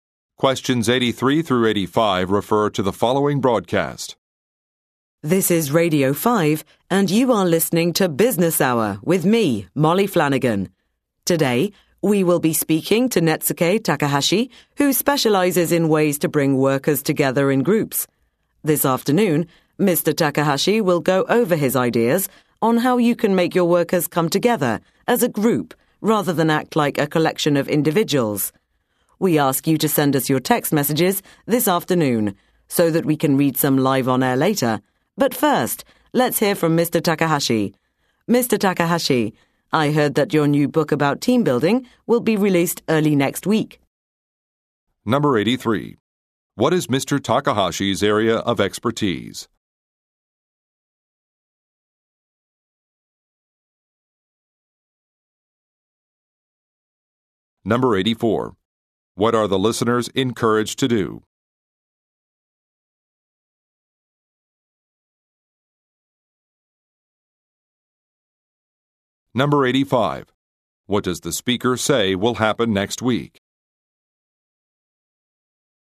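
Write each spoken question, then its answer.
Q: What is Mr. Takahashi's area of expertise?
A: Team building

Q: What are the listeners encouraged to do?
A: Send text messages

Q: What does the speaker say will happen next week?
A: Mr. Takahashi's book will be released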